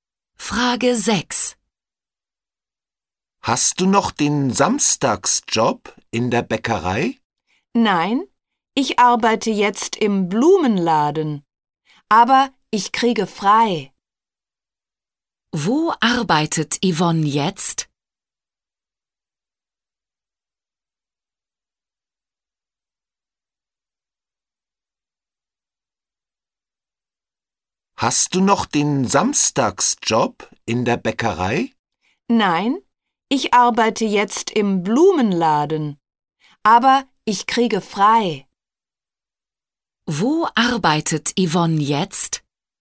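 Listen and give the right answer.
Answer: Im Blumenladen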